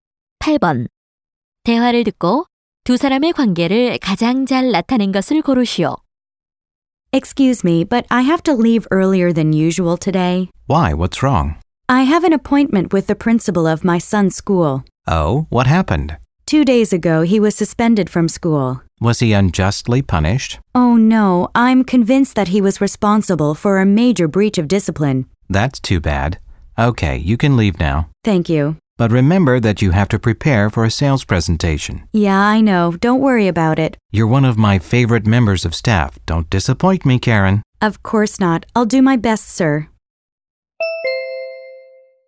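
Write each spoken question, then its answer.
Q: 대화를 듣고 두 사람의 관계를 가장 잘 나타낸 것을 고르시오.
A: 상사와 직원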